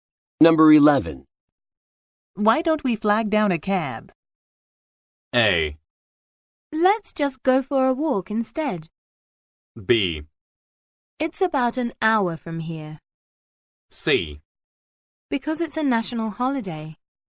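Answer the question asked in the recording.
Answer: A: Let's just go for a walk instead.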